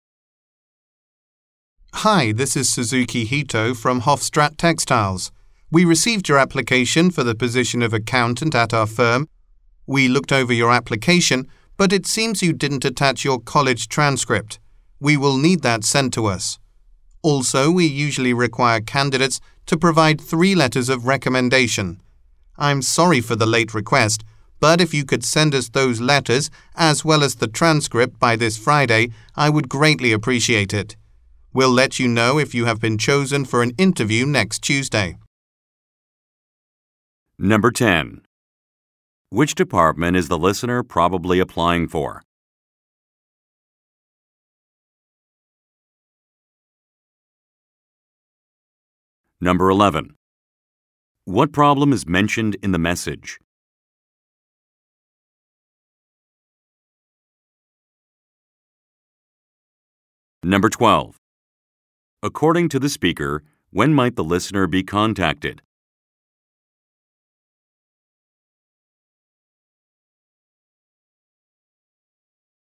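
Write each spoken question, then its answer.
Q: Which department is the listener probably applying for?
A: Accounting

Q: What problem is mentioned in the message?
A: The college transcript was not attached to the application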